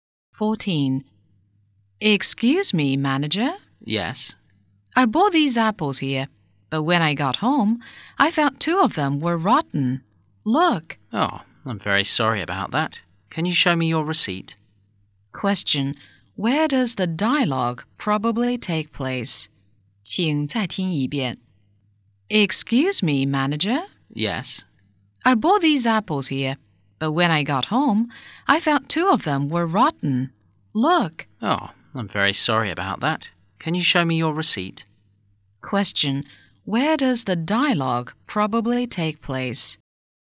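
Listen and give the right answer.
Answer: In a shop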